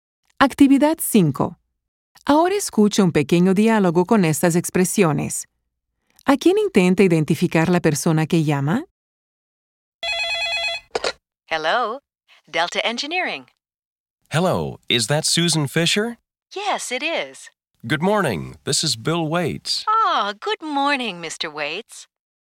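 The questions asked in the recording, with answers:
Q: ¿A quién intenta identificar la persona que llama?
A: A Susan Fisher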